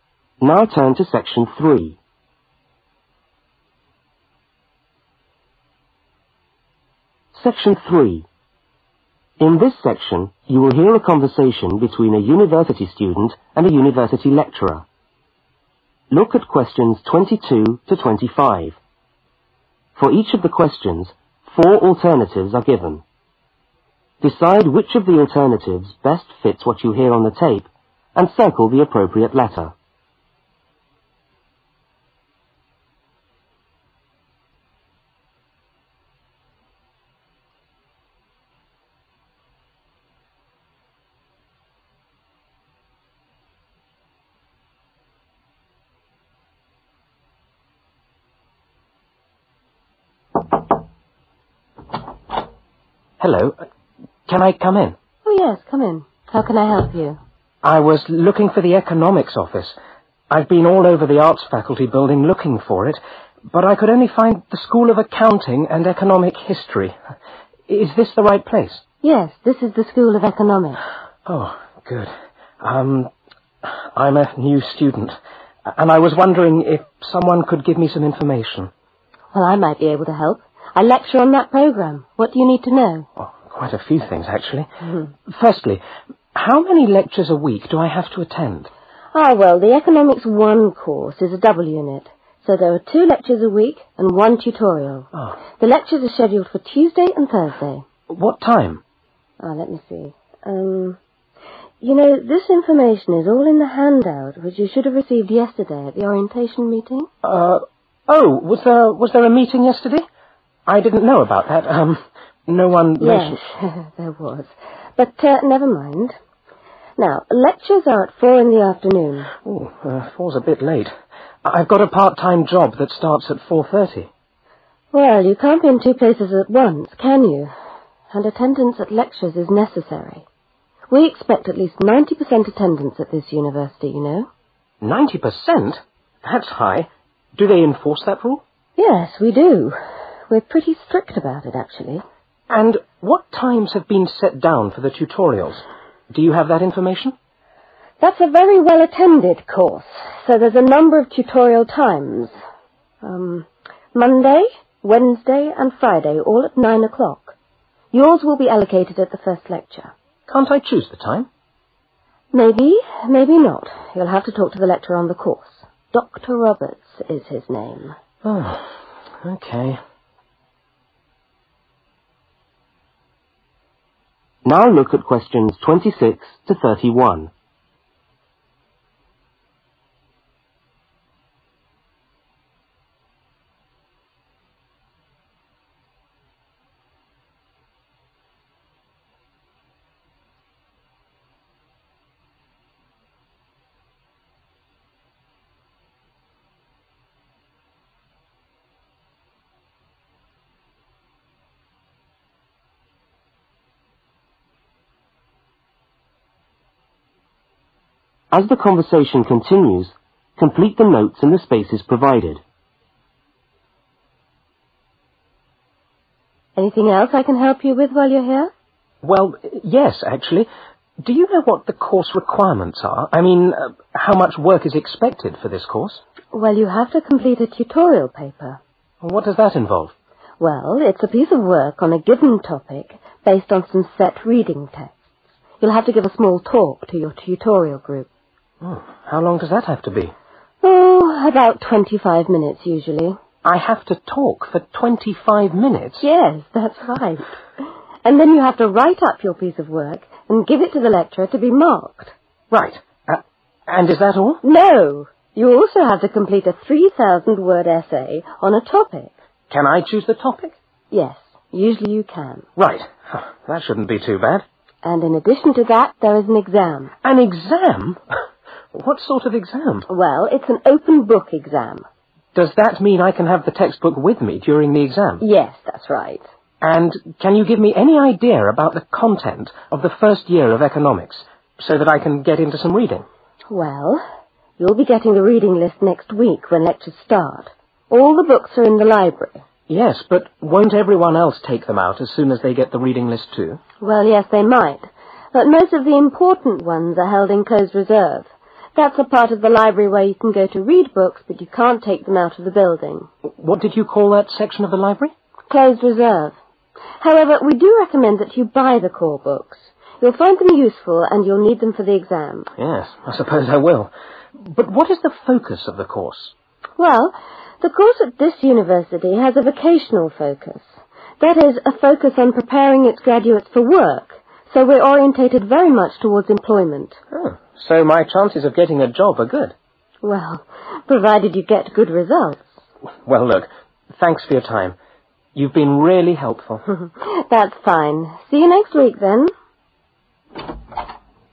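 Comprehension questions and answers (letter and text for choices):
Circle the appropriate letter.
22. The orientation meeting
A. took place recently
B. took place last term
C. will take place tomorrow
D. will take place next week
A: A. took place recently

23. Attendance at lectures is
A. optional after 4 pm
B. closely monitored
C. difficult to enforce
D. sometimes unnecessary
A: B. closely monitored

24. Tutorials take place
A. every morning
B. twice a week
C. three mornings a week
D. three afternoons a week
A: C. three mornings a week

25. The lecturer's name is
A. Roberts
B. Rawson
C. Rogers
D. Robertson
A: A. Roberts

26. (26) for 25 minutes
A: give a talk

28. Essay Topic: usually (28)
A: chosen by student

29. Type of exam: (29)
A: open book

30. Library: important books are in (30)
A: closed reserve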